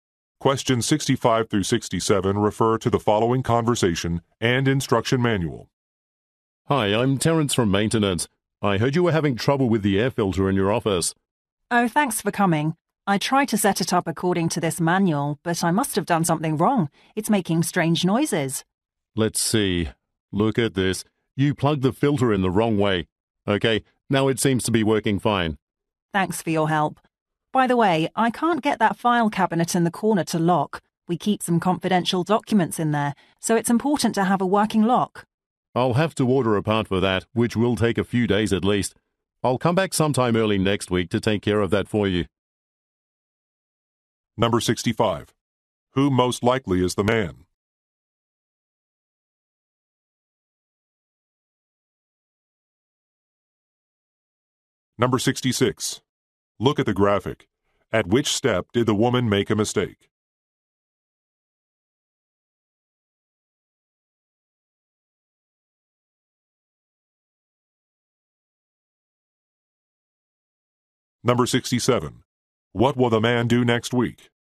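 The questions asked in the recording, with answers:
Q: Who most likely is the man?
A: A maintenance worker

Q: What will the man do next week?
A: Fix the file cabinet lock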